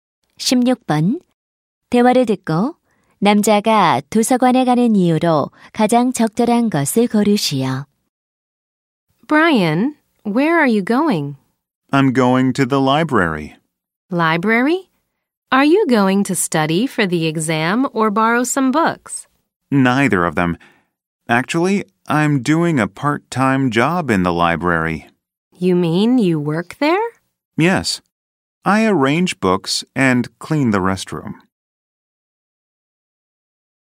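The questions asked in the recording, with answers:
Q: 대화를 듣고 남자가 도서관에 가는 이유로 가장 적절한 것을 고르시오.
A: 아르바이트를 하기 위해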